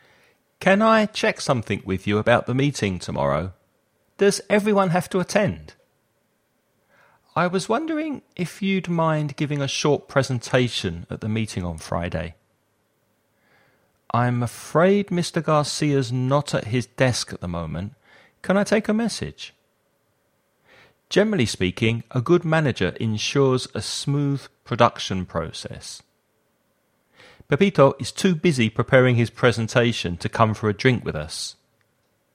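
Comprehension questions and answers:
Choose the best words for each gap.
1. Can I check something with you about the meeting tomorrow? Does everyone have to ?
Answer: attend

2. I was wondering if you'd mind a short presentation at the meeting on Friday?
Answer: giving

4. Generally speaking, a good manager a smooth production process.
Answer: ensures

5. Pepito is preparing his presentation to come for a drink with us.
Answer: too busy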